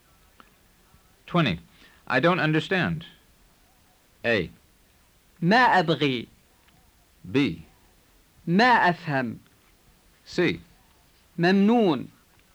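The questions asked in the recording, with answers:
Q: I don't understand.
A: B: ما أفهم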